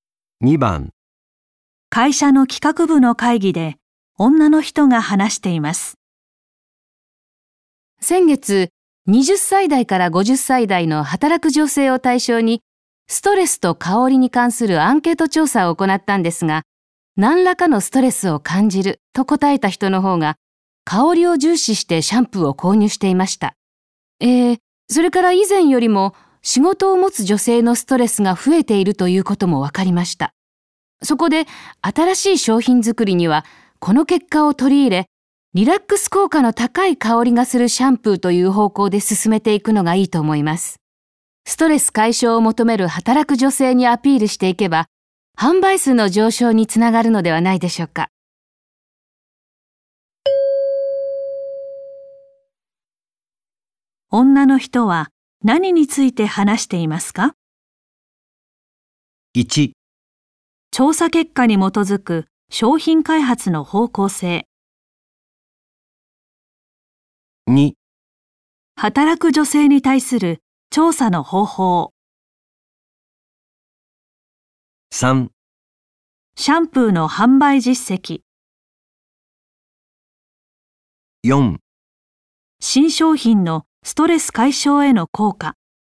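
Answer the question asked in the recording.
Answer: 1: 調査結果に基づく商品開発の方向性。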